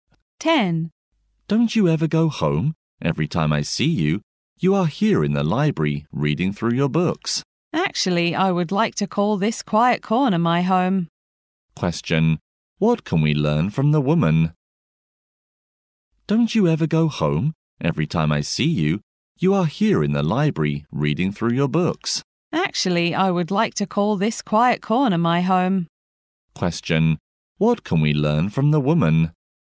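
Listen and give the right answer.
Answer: She spends a lot of time reading in the library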